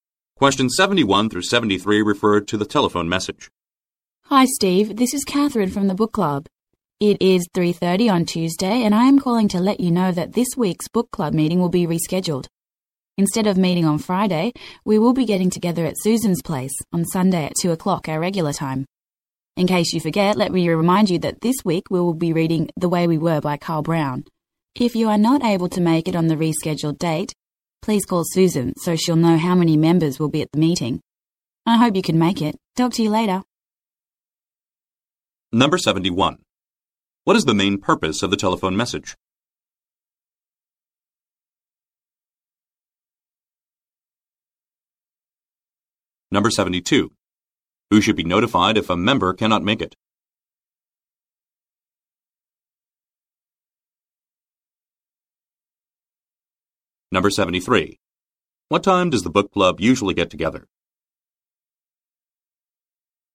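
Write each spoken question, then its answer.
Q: What is the main purpose of the telephone message?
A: To tell Steve that this week's book club meeting has been moved

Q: Who should be notified if a member cannot make it?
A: Susan

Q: What time does the book club usually get together?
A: 2 o'clock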